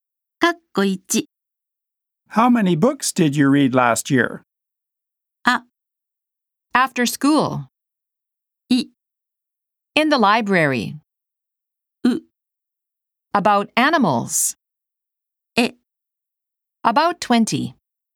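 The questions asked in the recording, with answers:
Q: How many books did you read last year?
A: E: About 20.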